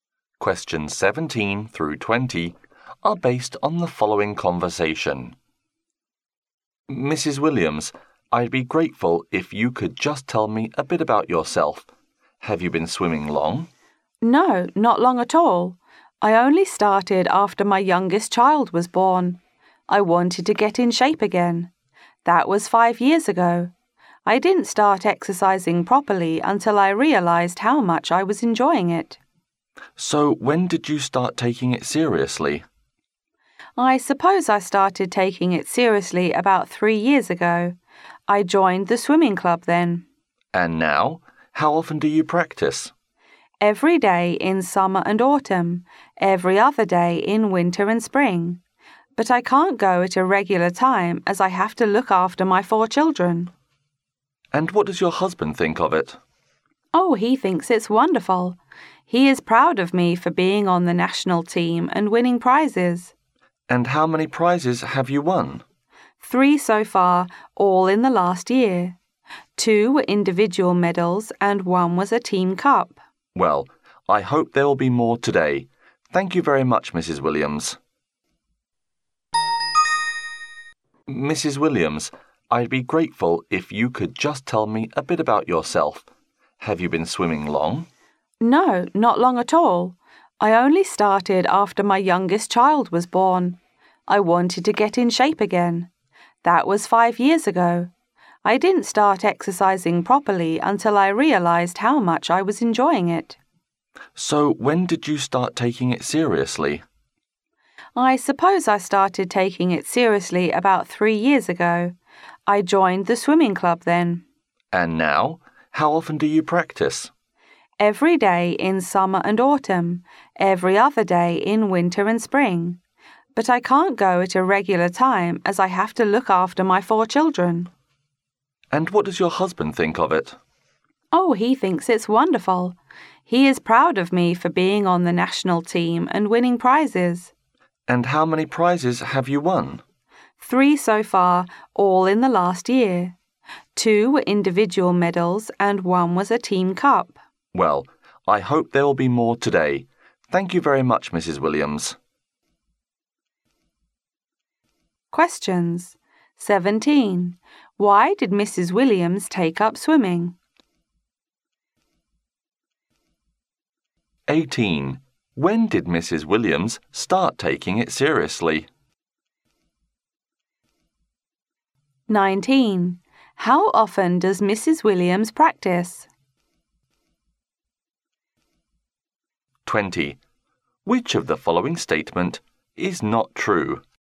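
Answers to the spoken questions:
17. To get in shape again after her youngest child was born
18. About 3 years ago
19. Every day in summer and autumn, every other day in winter and spring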